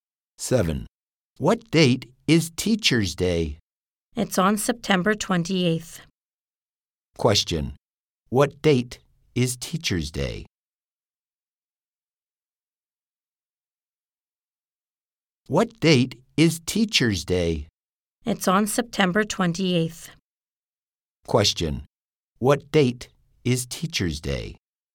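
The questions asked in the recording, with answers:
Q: What date is Teacher's Day?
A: September 28th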